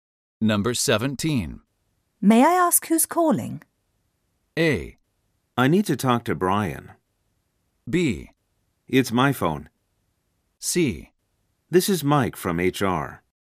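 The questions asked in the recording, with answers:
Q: May I ask who's calling?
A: C: This is Mike from HR.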